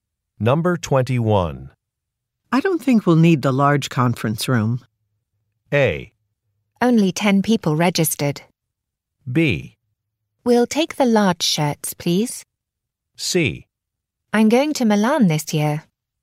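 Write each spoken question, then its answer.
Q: I don't think we'll need the large conference room.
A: A: Only 10 people registered.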